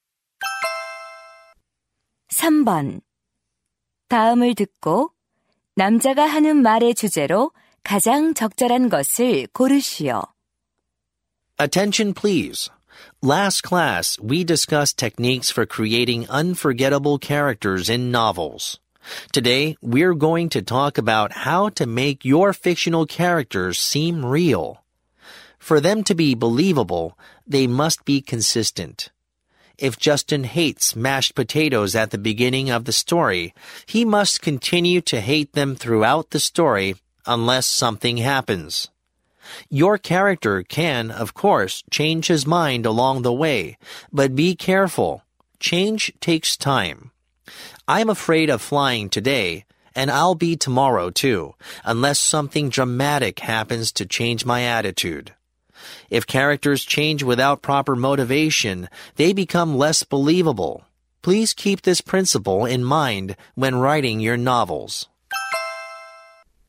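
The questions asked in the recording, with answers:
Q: 다음을 듣고 남자가 하는 말의 주제로 가장 적절한 것을 고르시오.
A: 소설 속 인물을 사실적으로 만들려면 일관성이 있어야 한다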